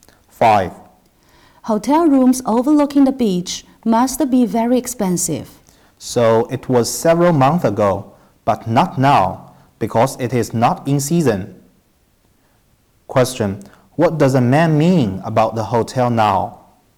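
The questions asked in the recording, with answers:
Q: What does the man mean about the hotel now?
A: The rooms are not expensive now because it is off season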